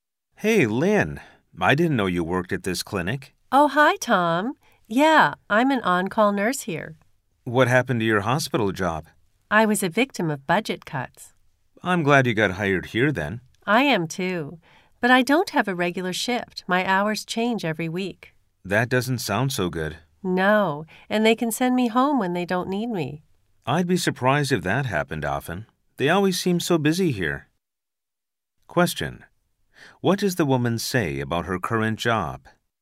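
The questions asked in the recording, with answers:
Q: What does the woman say about her current job?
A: She doesn't have a regular shift; her hours change every week.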